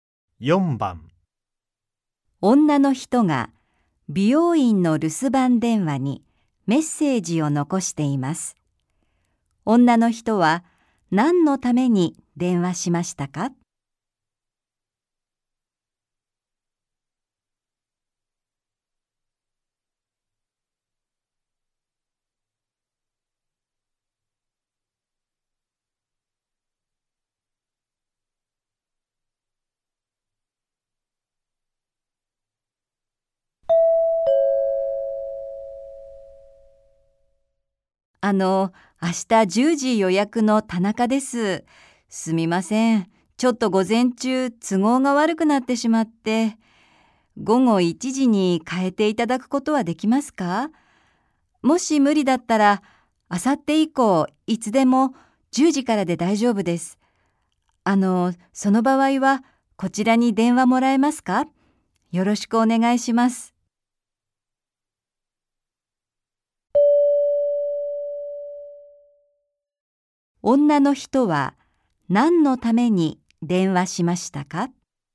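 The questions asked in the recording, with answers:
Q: 女の人は何のために電話しましたか?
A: 予約の時間を変えてもらうため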